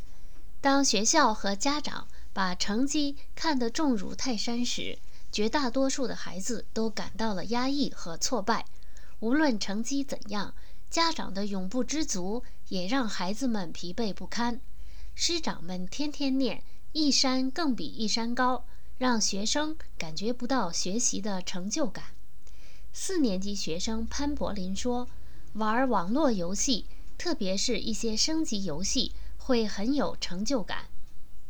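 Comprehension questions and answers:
Please answer the following questions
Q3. 为什么孩子们要在网络游戏中寻找成就感?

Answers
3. 因为学校和家长把成绩看得太重,家长永不知足,学生在学习中感觉不到成就感

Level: 3rd Year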